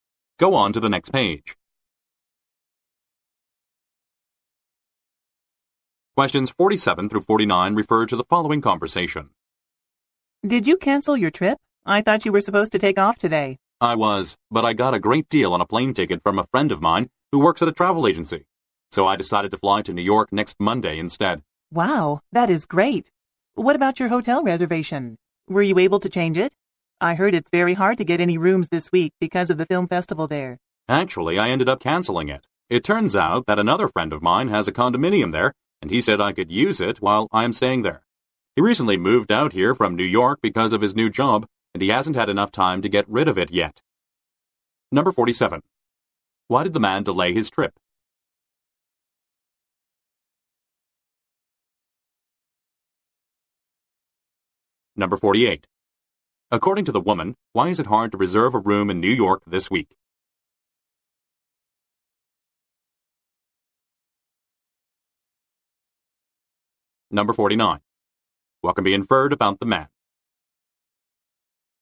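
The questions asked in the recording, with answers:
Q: Why did the man delay his trip?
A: He got a great deal on a plane ticket from a friend

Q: According to the woman, why is it hard to reserve a room in New York this week?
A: Because of the film festival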